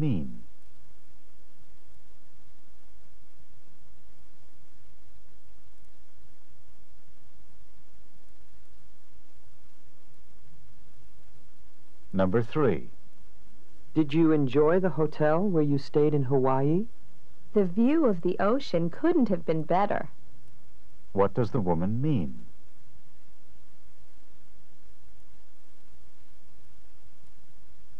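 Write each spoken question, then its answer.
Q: What does the woman mean?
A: The ocean view was excellent.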